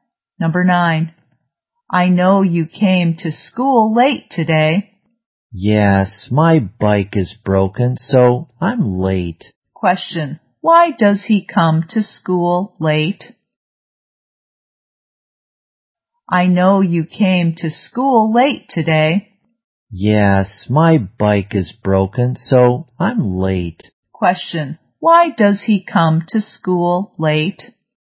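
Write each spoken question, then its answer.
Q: why does he come to school late?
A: His bike is broken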